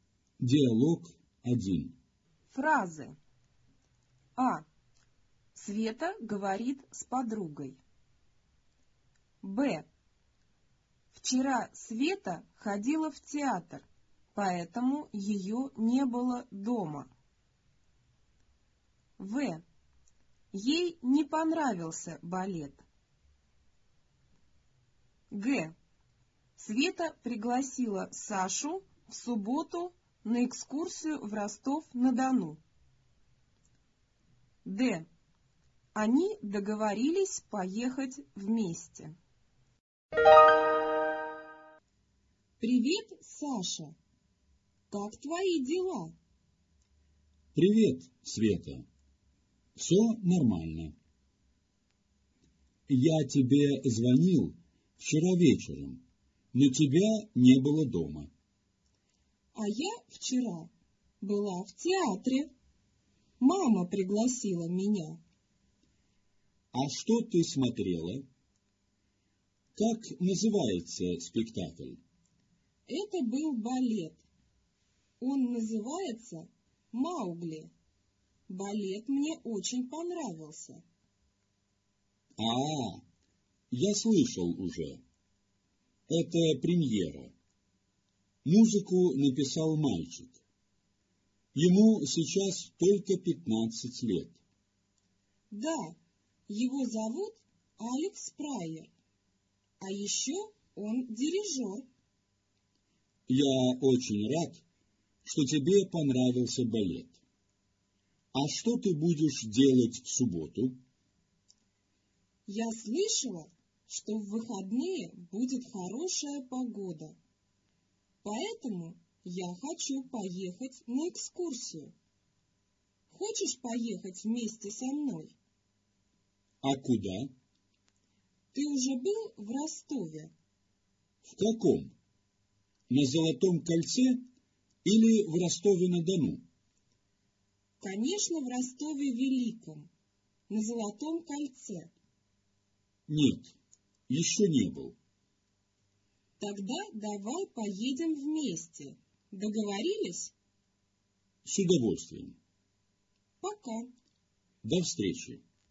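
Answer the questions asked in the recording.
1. минус (неверно)
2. плюс (верно)
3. минус (неверно)
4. минус (неверно)
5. плюс (верно)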